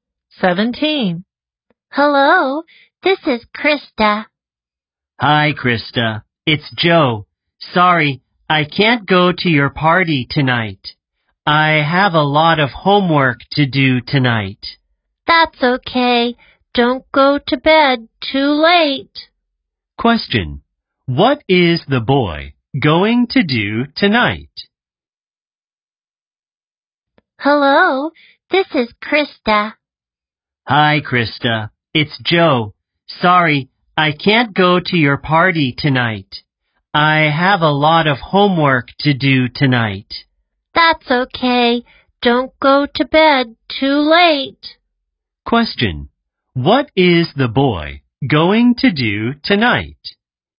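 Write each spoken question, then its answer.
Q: Question. What is the boy going to do tonight?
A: Do his homework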